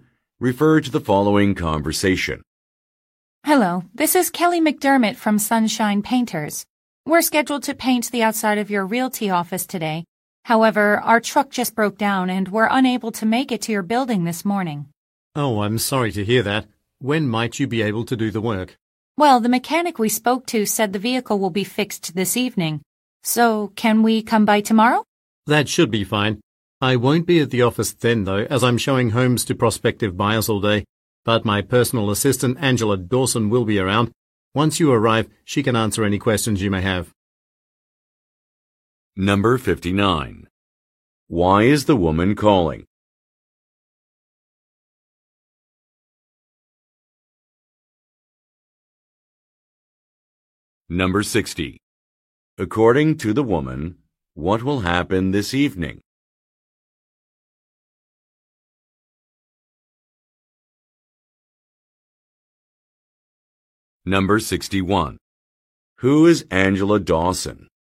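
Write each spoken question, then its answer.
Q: Why is the woman calling?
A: To say the painters can't come today because their truck broke down

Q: According to the woman, what will happen this evening?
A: The truck will be fixed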